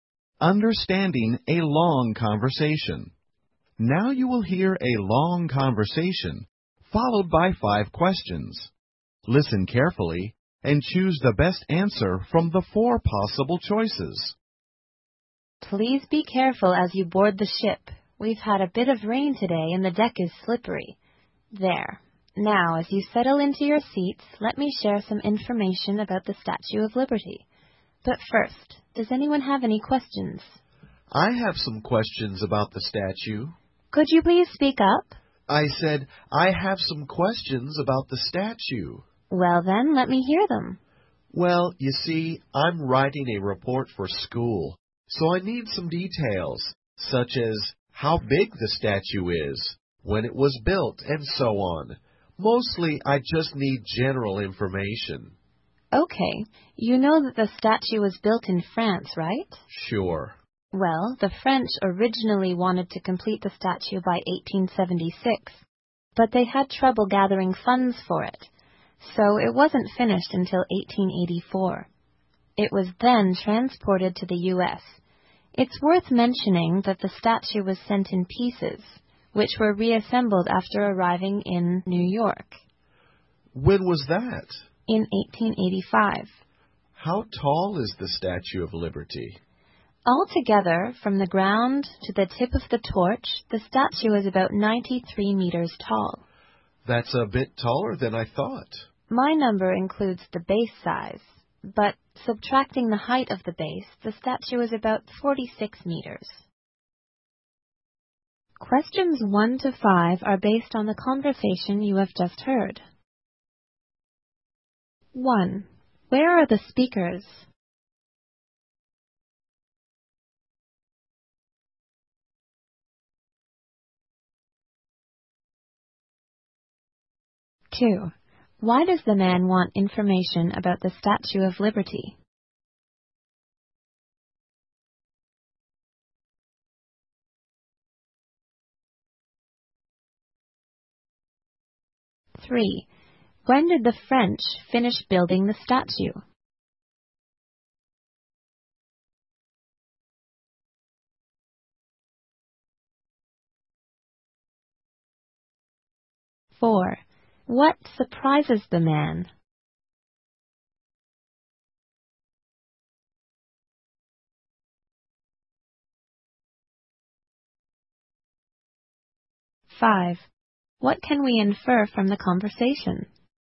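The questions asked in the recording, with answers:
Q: Where are the speakers?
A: On a ship

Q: Why does the man want information about the Statue of Liberty?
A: He is writing a report for school

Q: When did the French finish building the statue?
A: In 1884

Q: What surprises the man?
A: The statue is taller than he thought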